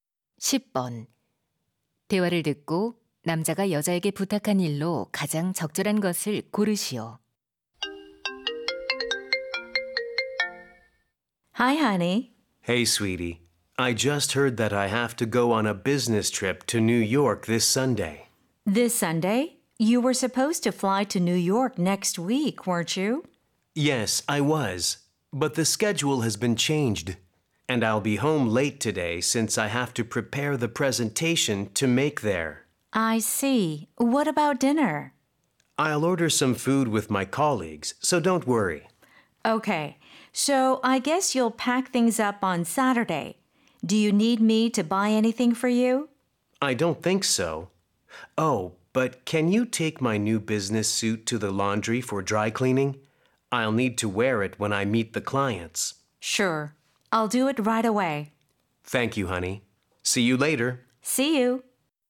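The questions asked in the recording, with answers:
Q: 대화를 듣고 남자가 여자에게 부탁한 일로 가장 적절한 것을 고르시오.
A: 새 정장을 세탁소에 드라이클리닝 맡기기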